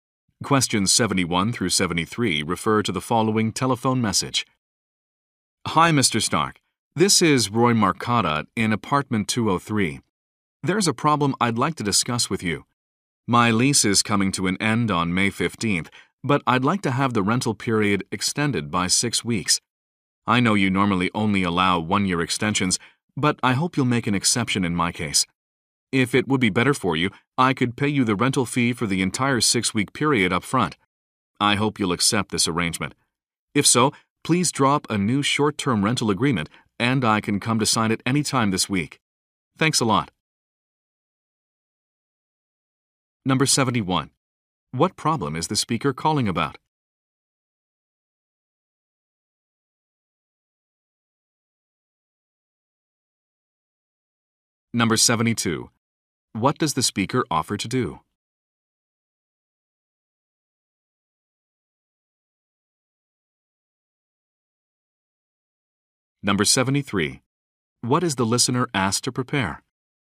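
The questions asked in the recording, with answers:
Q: What problem is the speaker calling about?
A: His lease ends May 15th and he wants it extended by 6 weeks

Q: What does the speaker offer to do?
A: Pay the full 6-week rent up front

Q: What is the listener asked to prepare?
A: A new short-term rental agreement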